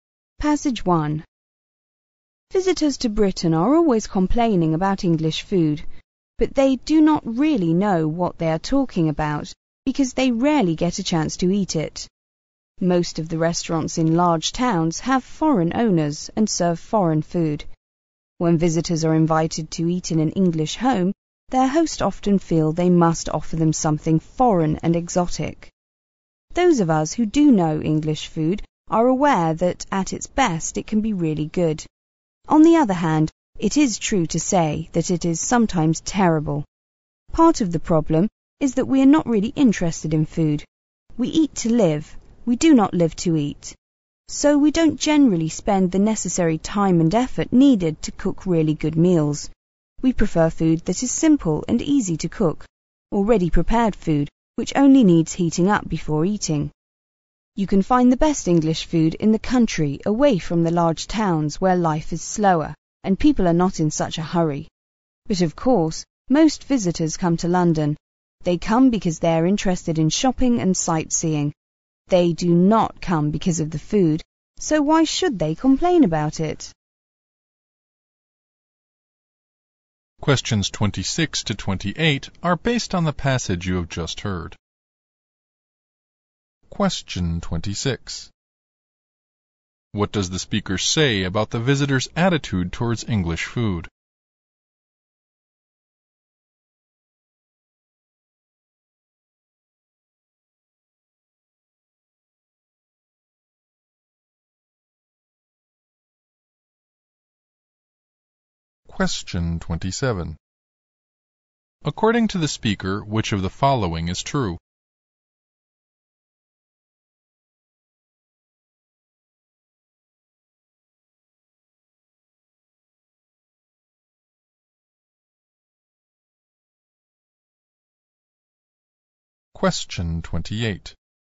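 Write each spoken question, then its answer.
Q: What does the speaker say about the visitor's attitude towards English food?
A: They complain about it without really knowing it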